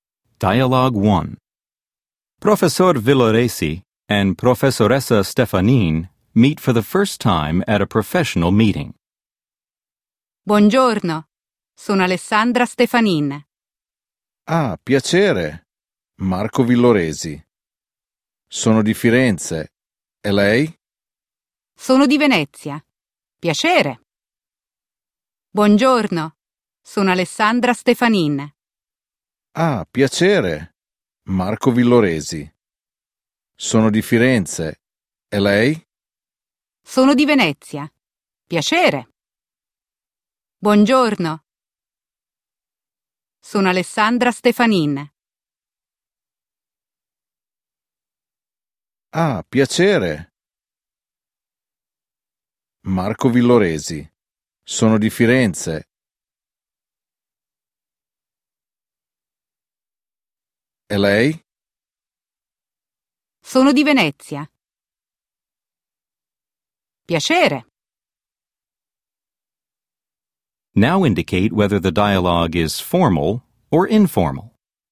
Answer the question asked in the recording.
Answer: 1. Formale.